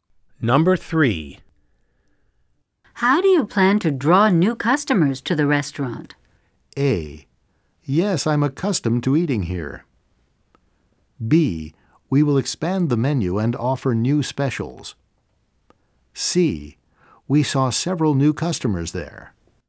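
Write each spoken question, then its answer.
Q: How do you plan to draw new customers to the restaurant?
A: B: We will expand the menu and offer new specials.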